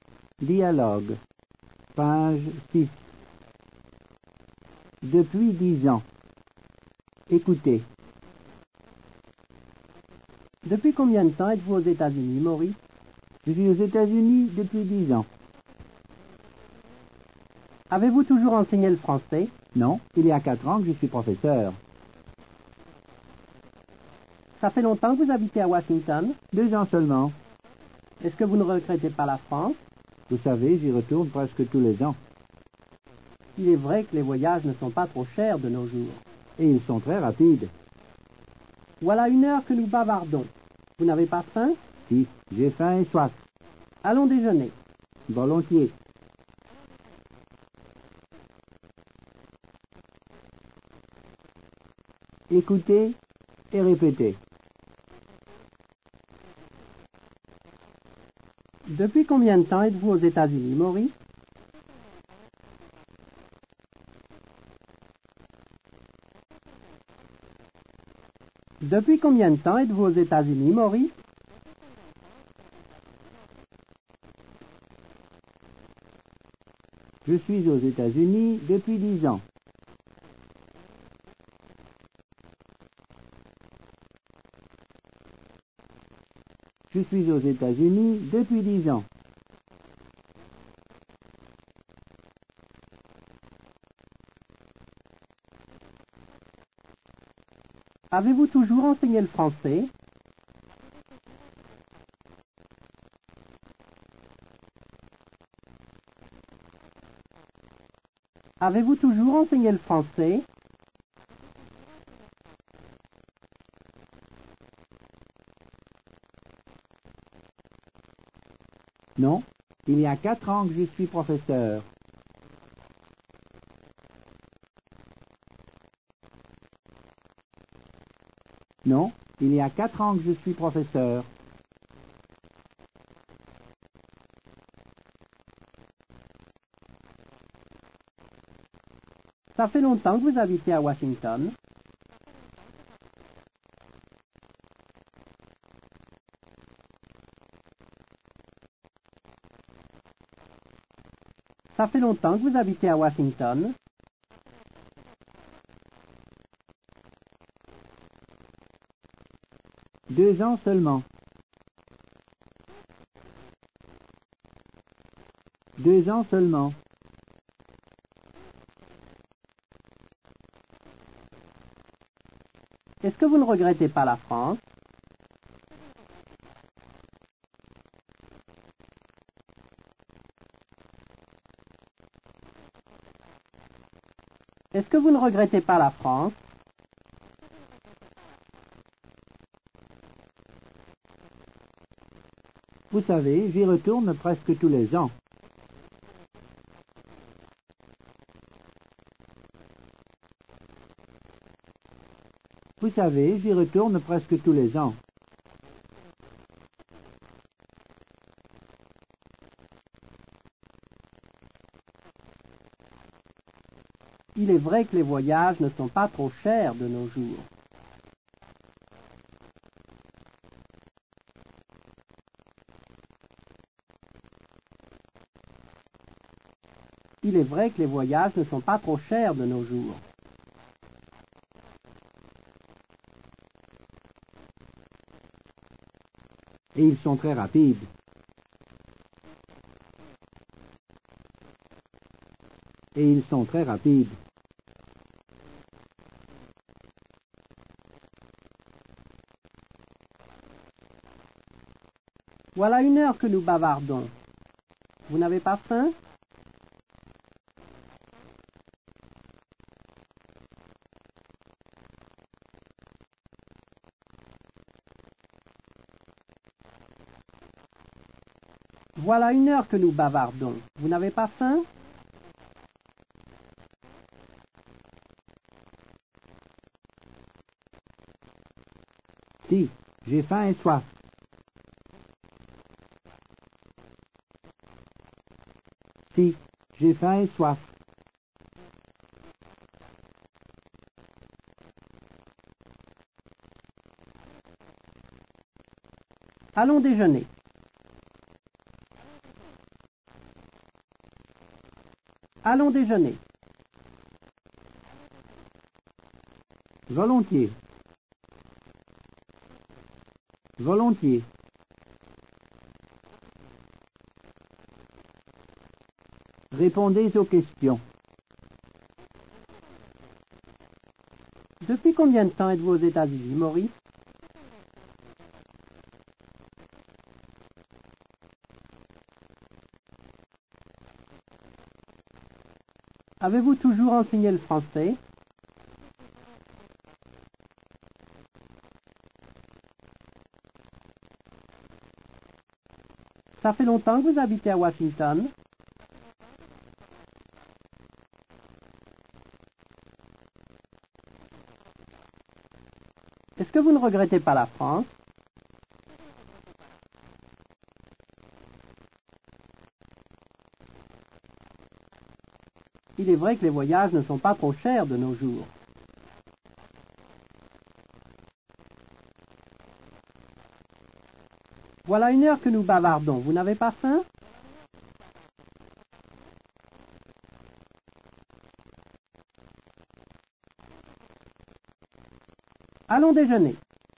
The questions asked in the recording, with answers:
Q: Depuis combien de temps êtes-vous aux États-Unis, Maurice?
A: Je suis aux États-Unis depuis 10 ans.

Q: Avez-vous toujours enseigné le français?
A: Non, il y a 4 ans que je suis professeur.

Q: Ça fait longtemps que vous habitez à Washington?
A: Deux ans seulement.

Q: Est-ce que vous ne regrettez pas la France?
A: Vous savez, j'y retourne presque tous les ans.

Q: Vous n'avez pas faim?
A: Si, j'ai faim et soif.